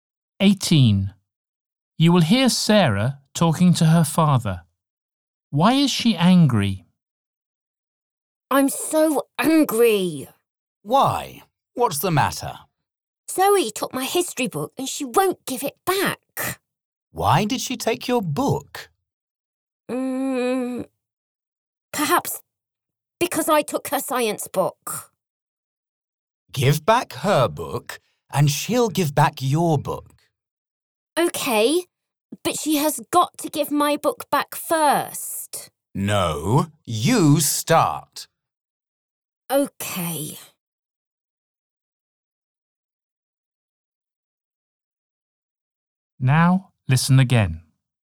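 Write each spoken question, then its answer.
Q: Why is she angry?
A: Zoe took her history book and won't give it back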